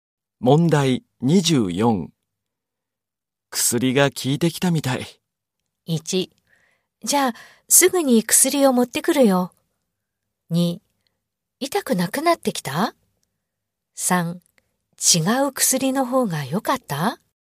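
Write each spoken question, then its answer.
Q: 薬が効いてきたみたい。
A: 2: 痛くなくなってきた?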